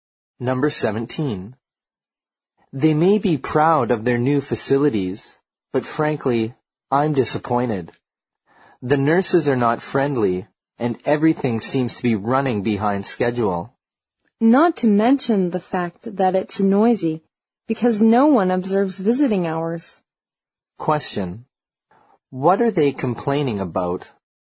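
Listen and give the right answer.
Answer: The service at the hospital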